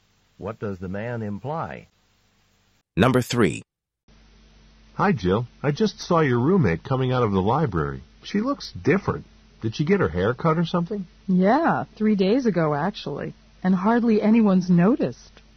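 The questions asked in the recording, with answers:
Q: What does the woman mean?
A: Her roommate got a haircut 3 days ago, but few people have noticed.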